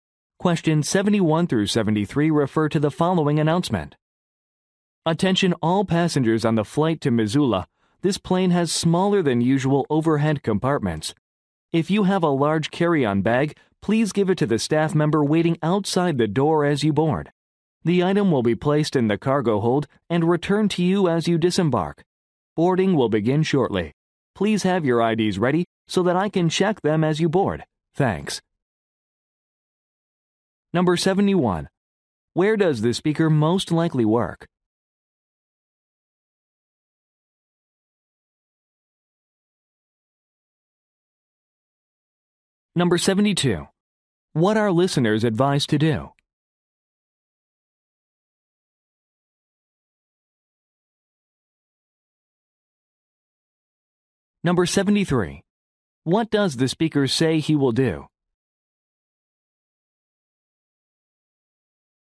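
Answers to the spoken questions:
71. At an airport (airline boarding gate)
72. Give large carry-on bags to the staff member outside the door
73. Check passengers' IDs as they board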